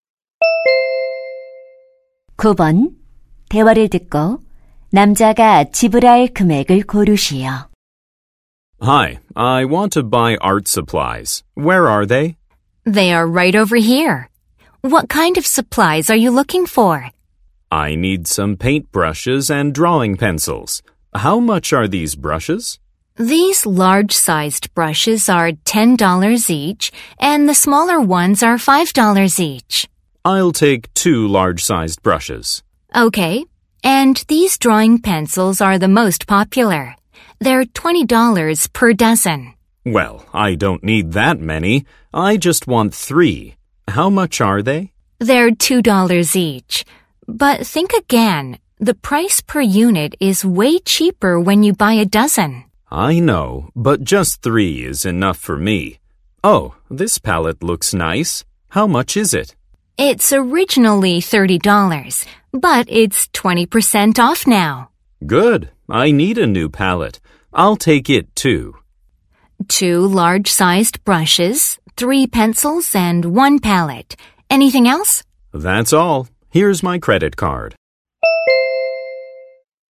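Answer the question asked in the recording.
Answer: 50달러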